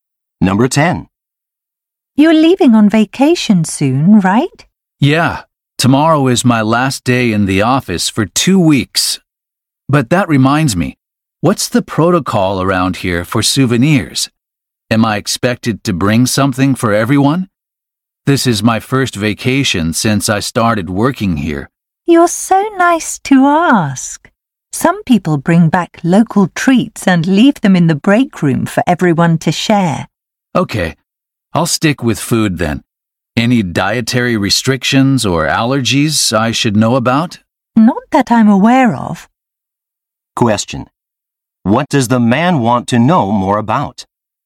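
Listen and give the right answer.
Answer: Whether he is expected to bring back souvenirs for his coworkers.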